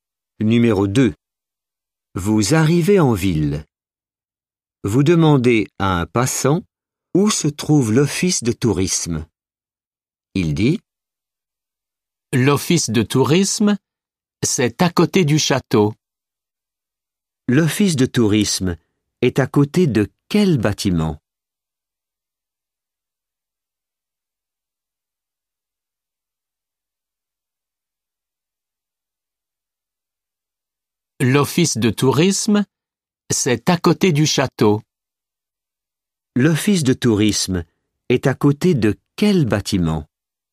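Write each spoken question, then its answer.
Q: L'office de tourisme est à côté de quel bâtiment?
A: le château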